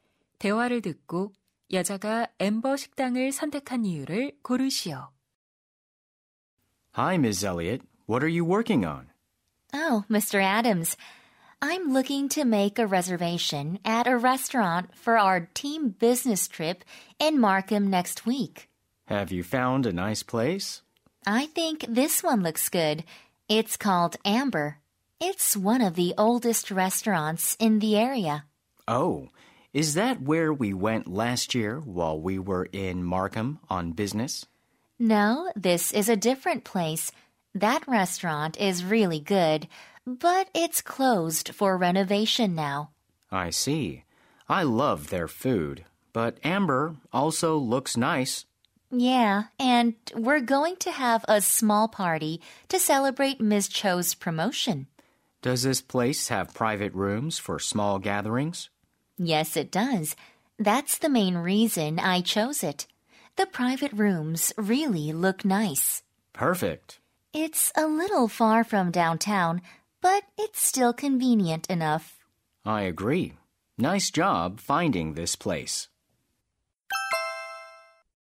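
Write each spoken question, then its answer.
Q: 대화를 듣고 여자가 앰버 식당을 선택한 이유를 고르시오.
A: 작은 모임을 위한 별실이 있어서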